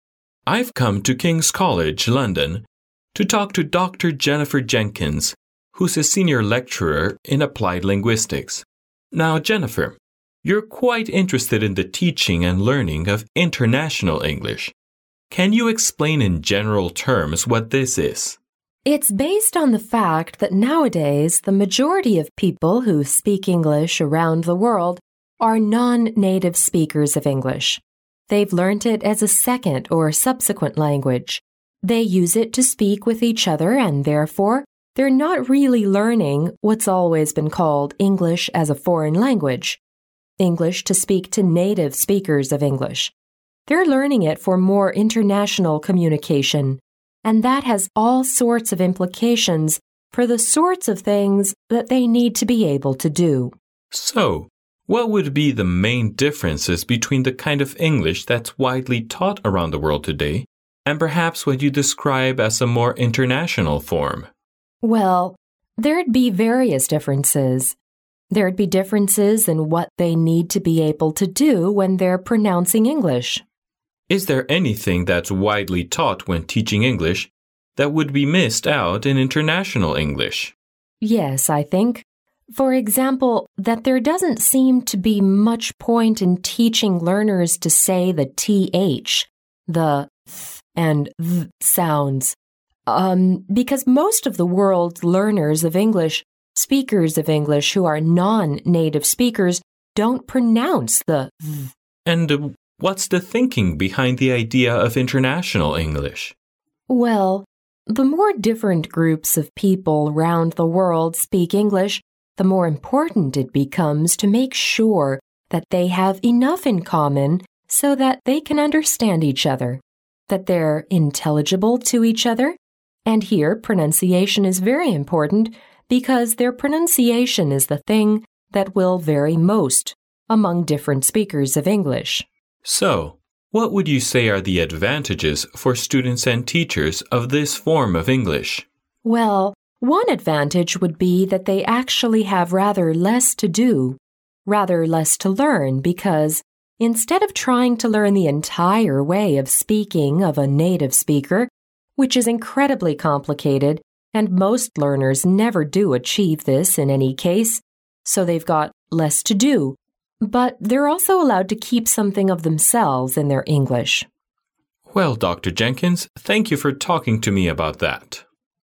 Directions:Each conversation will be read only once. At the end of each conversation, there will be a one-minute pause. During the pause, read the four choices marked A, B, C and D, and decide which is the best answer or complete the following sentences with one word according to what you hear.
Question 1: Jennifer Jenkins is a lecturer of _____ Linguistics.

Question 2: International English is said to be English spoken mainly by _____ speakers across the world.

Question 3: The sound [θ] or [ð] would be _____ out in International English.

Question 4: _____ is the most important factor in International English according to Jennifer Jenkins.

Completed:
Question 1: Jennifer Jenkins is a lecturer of Applied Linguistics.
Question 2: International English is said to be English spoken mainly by non-native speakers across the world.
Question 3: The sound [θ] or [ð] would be missed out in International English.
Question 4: Pronunciation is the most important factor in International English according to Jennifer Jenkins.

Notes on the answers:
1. 对话第一句男士就直接指出他来的目的,并且交代出Jennifer Jenkins的身份,即"a Senior Lecturer in Applied Linguistics",由此可得知答案。
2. 男士向女士提出的第一个问题就是希望她能广泛意义地解释一下International English的含义,女士回答到所谓的International English主要是指non-native speakers用的英语,由此可得知答案。
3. 男士询问International English与标准英语的区别,女士提出发音问题,并特别指出[θ]和[ð]的发音。她说到这两个音之所以常常不发,正是因为"most of the non-native speakers don't pronounce the [θ]",即很多非母语使用者不发这个音而不是因为不会发这个音也不影响沟通。
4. 随后男士又询问了女士关于International English的背后理念问题,女士指出其中最重要的一点就是人们的发音问题。

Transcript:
M: I've come to Kings College, London, to talk to Dr. Jennifer Jenkins, who's a Senior Lecturer in Applied Linguistics. Now Jennifer, you're quite interested in the teaching and learning of International English. Can you explain in general terms what this is?
W: It's based on the fact that nowadays the majority of people who speak English around the world are nonnative speakers of English—they've learnt it as a second or subsequent language. They use it to speak with each other and therefore, they're not really learning what's always been called English as a foreign language—English to speak to native speakers of English. They're learning it for more international communication, and that has all sorts of implications for the sorts of things that they need to be able to do.
M: So, what would be the main differences between the kind of English that's widely taught around the world today, and perhaps what you describe as a more international form?
W: Well, there'd be various differences. There'd be differences in what they need to be able to do when they're pronouncing English.
M: Is there anything that's widely taught when teaching English that would be missed out in International English?
W: Yes, I think, for example, that... there doesn't seem to be much point in teaching learners to say the T-H, the [θ] and [ð] sounds, erm, because most of the world's learners of English, speakers of English who are non-native speakers don't pronounce the [θ].
M: And, what is the thinking behind the idea of International English?
W: Well, the more different groups of people round the world speak English, the more important it becomes to make sure that they have enough in common so that they can understand each other, that they're intelligible to each other and here, pronunciation is very important because their pronunciation is the thing that will vary most, among different speakers of English.
M: So, what would you say are the advantages for students and teachers of this form of English?
W: Well, one advantage would be that they actually have rather less to do, rather less to learn because instead of trying to learn the entire way of speaking of a native speaker, which is incredibly complicated and most learners never do achieve this in any case, so they've got less to do, but they're also allowed to keep something of themselves in their English.
M: Well, Dr. Jenkins, thank you for talking to me about that.